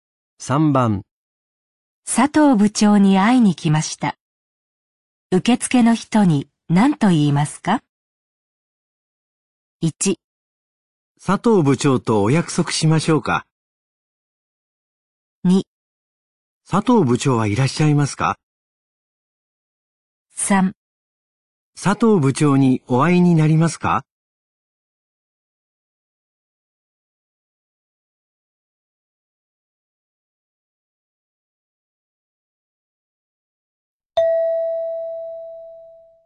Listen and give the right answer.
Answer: 2

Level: N3 Listening · Test 12